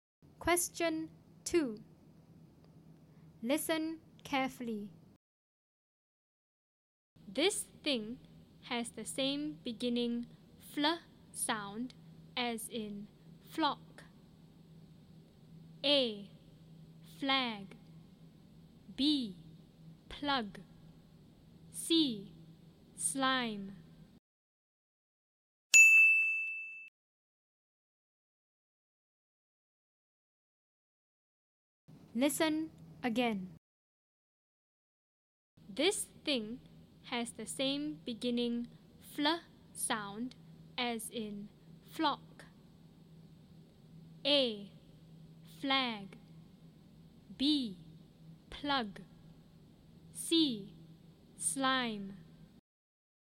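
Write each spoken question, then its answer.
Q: This thing has the same beginning fl sound as in flock.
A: A: Flag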